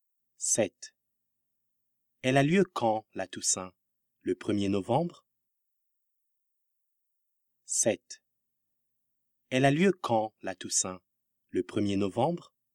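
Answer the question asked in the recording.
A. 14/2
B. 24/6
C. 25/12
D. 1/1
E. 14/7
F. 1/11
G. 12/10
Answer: F. 1/11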